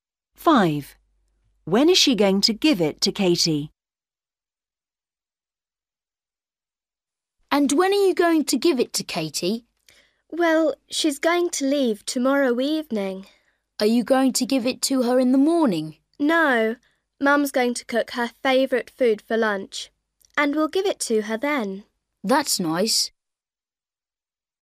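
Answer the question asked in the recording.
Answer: at lunch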